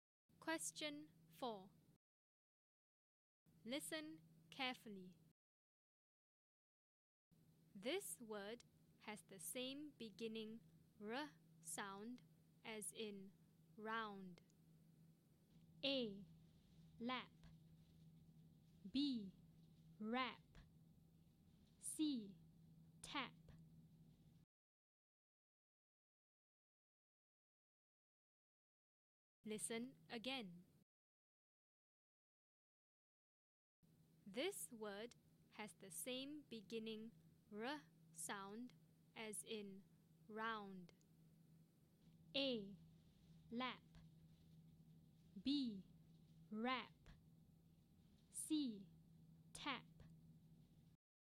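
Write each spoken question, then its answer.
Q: This word has the same beginning r sound as in round.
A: B: Rap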